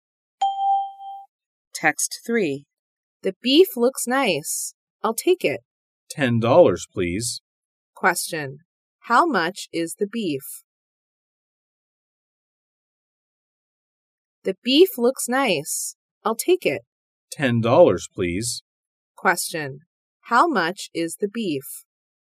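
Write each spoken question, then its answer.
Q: How much is the beef?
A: $10.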